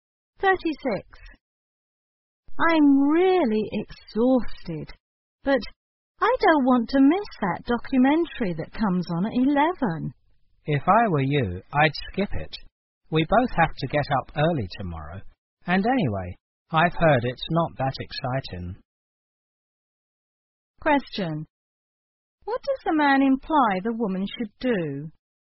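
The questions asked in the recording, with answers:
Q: What does the man imply the woman should do?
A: Skip the documentary and go to bed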